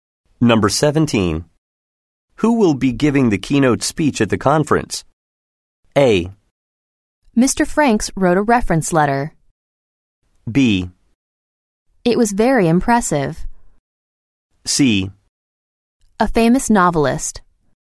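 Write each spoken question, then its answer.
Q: Who will be giving the keynote speech at the conference?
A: C: A famous novelist.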